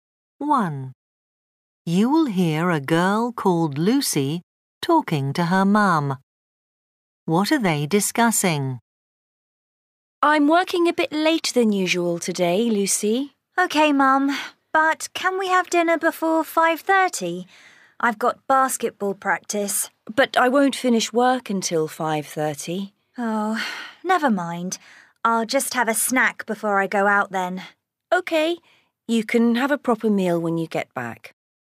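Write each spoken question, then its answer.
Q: What are they discussing?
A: when to have dinner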